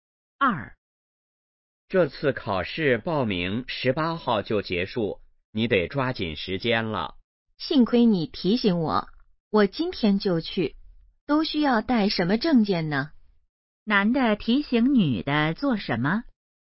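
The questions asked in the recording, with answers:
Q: 男的提醒女的做什么?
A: 抓紧时间报名考试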